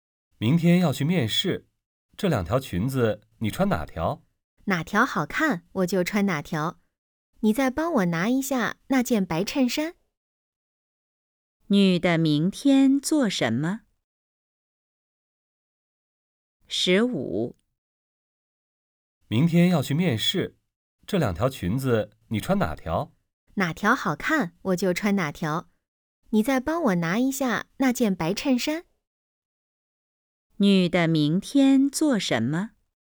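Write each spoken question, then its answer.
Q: 女的明天做什么?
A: 去面试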